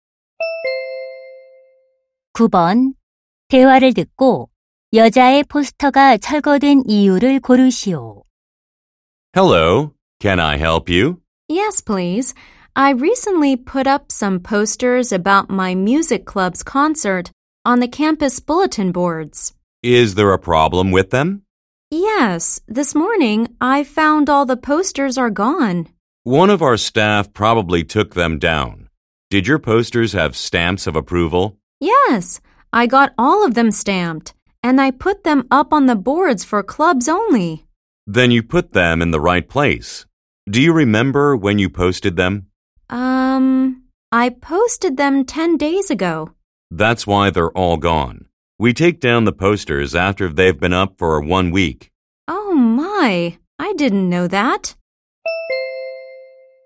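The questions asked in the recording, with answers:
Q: 대화를 듣고 여자의 포스터가 철거된 이유를 고르시오.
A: 게시 기간 1주일이 지나서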